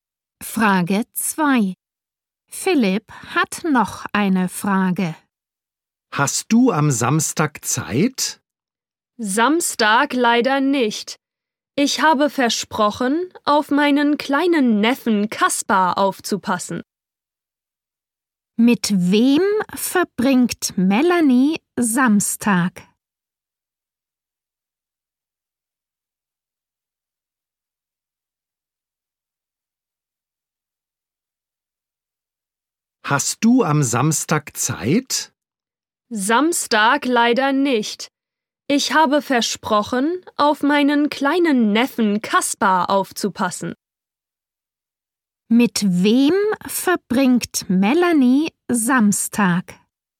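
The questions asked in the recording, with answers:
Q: Mit wem verbringt Melanie Samstag?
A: Mit ihrem kleinen Neffen Kaspar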